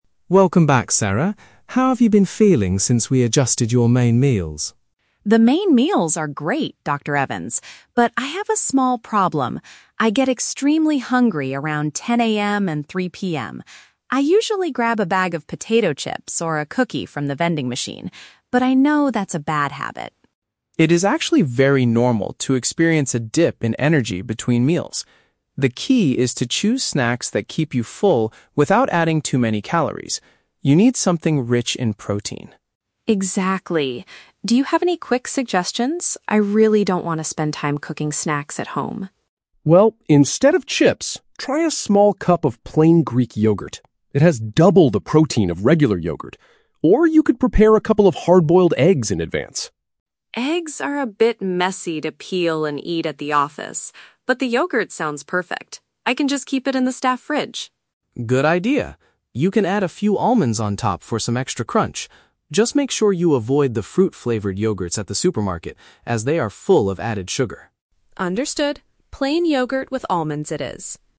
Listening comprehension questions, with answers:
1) What specific issue is Sarah currently facing during the day?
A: She experiences strong feelings of hunger between her main meals.

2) What is the nutritionist's main requirement for a healthy snack?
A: It should contain a high amount of protein to keep her full.

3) Why does Sarah prefer the yogurt over the eggs?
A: She thinks the yogurt is a much cleaner and easier food for her workplace.

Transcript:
Dr. Evans: Welcome back, Sarah. How have you been feeling since we adjusted your main meals?
Sarah: The main meals are great, Dr. Evans. But I have a small problem. I get extremely hungry around 10 AM and 3 PM. I usually grab a bag of potato chips or a cookie from the vending machine, but I know that's a bad habit.
Dr. Evans: It is actually very normal to experience a dip in energy between meals. The key is to choose snacks that keep you full without adding too many calories. You need something rich in protein.
Sarah: Exactly. Do you have any quick suggestions? I really don't want to spend time cooking snacks at home.
Dr. Evans: Well, instead of chips, try a small cup of plain Greek yogurt. It has double the protein of regular yogurt. Or, you could prepare a couple of hard-boiled eggs in advance.
Sarah: Eggs are a bit messy to peel and eat at the office. But the yogurt sounds perfect. I can just keep it in the staff fridge.
Dr. Evans: Good idea. You can add a few almonds on top for some extra crunch. Just make sure you avoid the fruit-flavored yogurts at the supermarket, as they are full of added sugar.